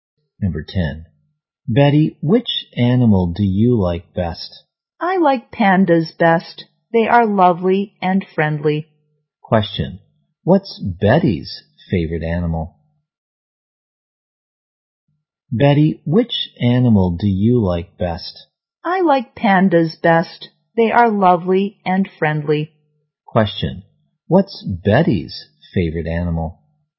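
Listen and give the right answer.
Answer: Pandas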